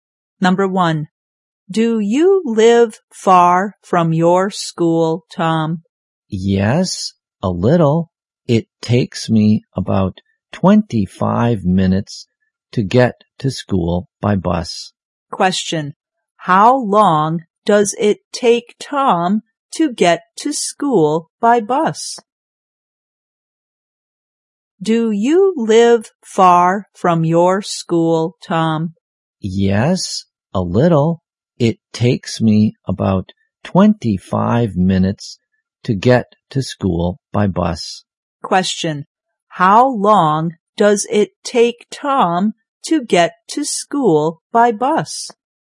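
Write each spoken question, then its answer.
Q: How long does it take Tom to get to school by bus?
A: About 25 minutes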